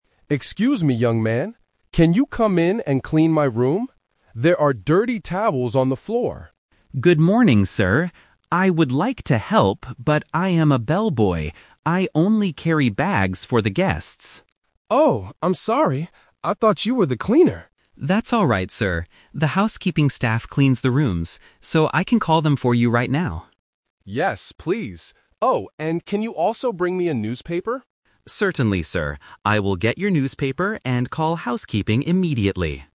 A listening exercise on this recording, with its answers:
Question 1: What is Leo's main job at the hotel?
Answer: Carrying bags for guests

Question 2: Who will clean the dirty towels on the floor?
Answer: The housekeeping staff

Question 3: What will Leo do for Mr. Davis now?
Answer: He will call housekeeping and bring a newspaper.

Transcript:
Davis: Excuse me, young man. Can you come in and clean my room? There are dirty towels on the floor.
Leo: Good morning, sir. I would like to help, but I am a bellboy. I only carry bags for the guests.
Mr. Davis: Oh, I'm sorry! I thought you were the cleaner.
Leo: That's alright, sir. The housekeeping staff cleans the rooms. So, I can call them for you right now.
Mr. Davis: Yes, please. Oh, and can you also bring me a newspaper?